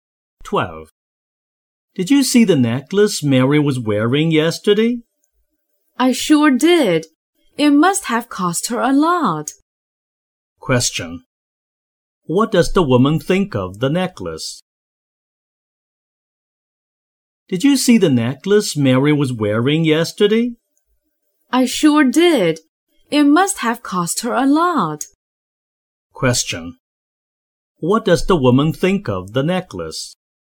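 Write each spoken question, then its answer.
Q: What does the woman think of the necklace?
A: It is expensive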